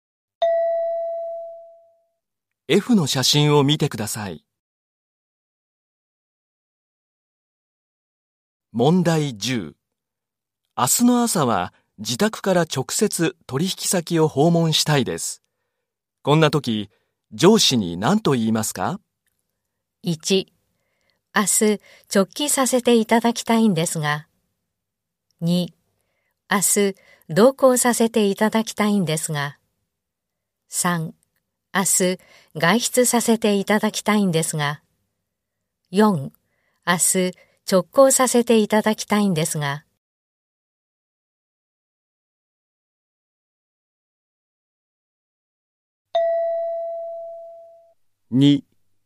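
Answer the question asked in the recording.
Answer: 4: 明日直行させていただきたいんですが。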